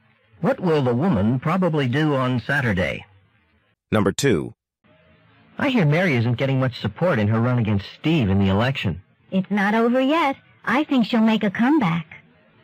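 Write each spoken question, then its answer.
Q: What does the woman mean?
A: Mary may still win the election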